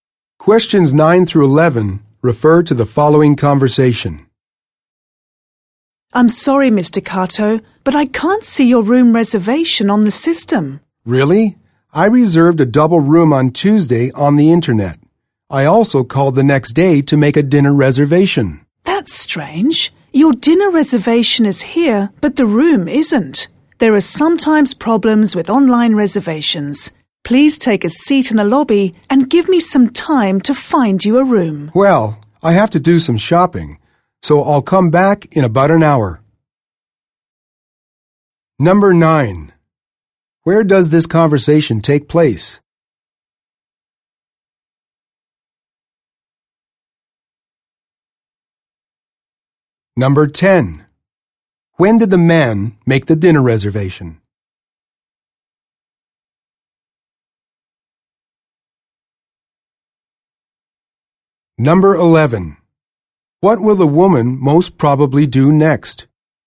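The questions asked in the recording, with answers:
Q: Where does this conversation take place?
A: At a hotel (reception desk)

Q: When did the man make the dinner reservation?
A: On Wednesday (the day after Tuesday)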